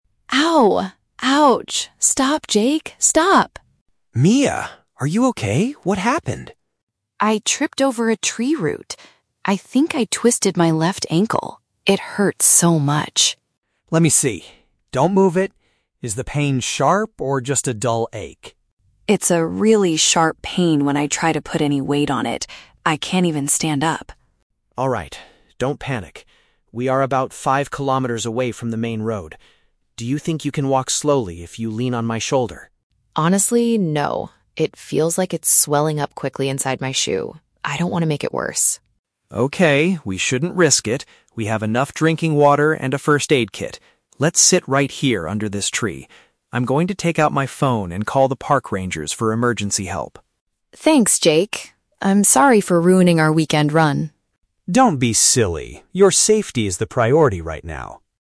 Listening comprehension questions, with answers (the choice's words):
Listen to the conversation between two trail runners. Choose the correct answer (A, B, or C) for each question.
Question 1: How did Mia injure herself during the run?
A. She dropped a heavy backpack on her foot.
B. She fell over a piece of wood on the ground.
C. She was hit by a falling rock from the mountain.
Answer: She fell over a piece of wood on the ground.

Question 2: How does Mia describe her current physical condition?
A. She experiences intense pain if she tries to stand on her foot.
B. She feels a mild, dull ache but can still walk slowly.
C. Her ankle is bleeding heavily inside her running shoe.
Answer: She experiences intense pain if she tries to stand on her foot.

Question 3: What do they finally decide to do to solve the problem?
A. To walk five kilometers to the nearest main road together.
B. To use the first-aid kit to fix the ankle and continue running.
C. To stay in their current location and contact the authorities.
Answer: To stay in their current location and contact the authorities.

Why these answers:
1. Mia says, "I tripped over a tree root." A "tree root" is a piece of wood on the ground, and "tripped over" means she fell over it.
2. Mia states, "It's a really sharp pain when I try to put any weight on it. I can't even stand up." "Sharp pain" is intense pain, and "put any weight on it" means trying to stand on her foot.
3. Jake says, "Let's sit right here... I'm going to... call the park rangers for emergency help." "Sit right here" means staying in their current location, and "park rangers" are the authorities.

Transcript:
Mia: Ow! Ouch... stop, Jake, stop!
Jake: Mia! Are you okay? What happened?
Mia: I tripped over a tree root. I think I twisted my left ankle. It hurts so much.
Jake: Let me see. Don't move it. Is the pain sharp or just a dull ache?
Mia: It's a really sharp pain when I try to put any weight on it. I can't even stand up.
Jake: Alright, don't panic. We are about five kilometers away from the main road. Do you think you can walk slowly if you lean on my shoulder?
Mia: Honestly, no. It feels like it's swelling up quickly inside my shoe. I don't want to make it worse.
Jake: Okay, we shouldn't risk it. We have enough drinking water and a first-aid kit. Let's sit right here under this tree. I'm going to take out my phone and call the park rangers for emergency help.
Mia: Thanks, Jake. I'm sorry for ruining our weekend run.